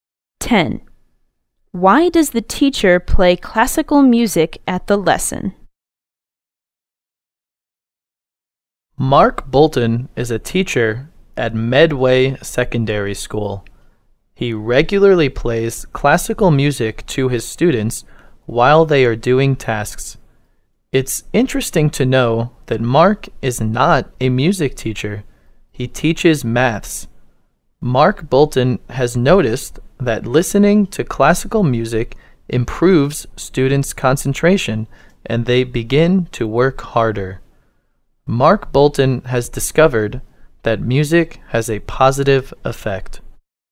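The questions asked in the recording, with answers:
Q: Why does the teacher play classical music at the lesson?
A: It improves students' concentration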